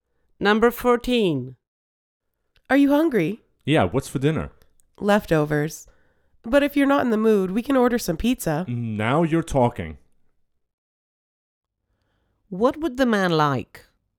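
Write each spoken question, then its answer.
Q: What would the man like?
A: To order pizza.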